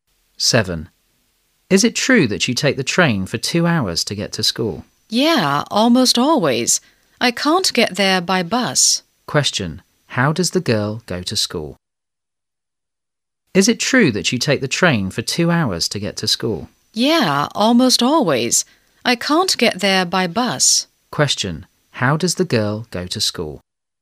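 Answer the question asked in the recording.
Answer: By train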